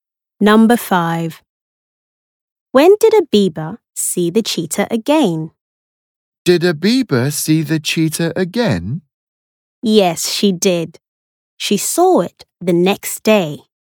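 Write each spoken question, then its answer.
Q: When did a beaver see the cheetah again?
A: The next day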